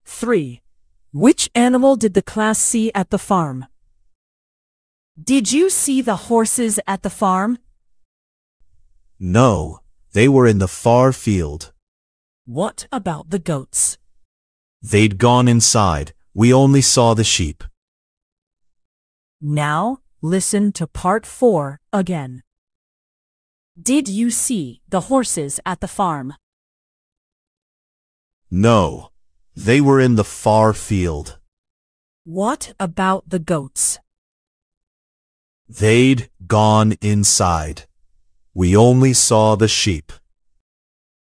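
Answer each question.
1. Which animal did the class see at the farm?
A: the sheep

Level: 劍橋兒童英檢 Flyers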